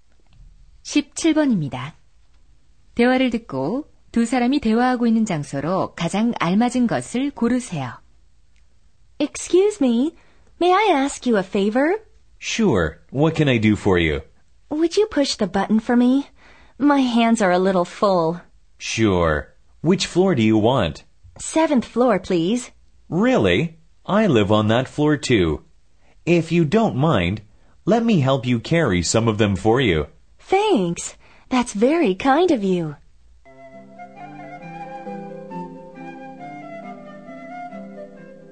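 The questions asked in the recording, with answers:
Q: 대화를 듣고 두 사람이 대화하고 있는 장소로 가장 알맞은 것을 고르세요.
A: 엘리베이터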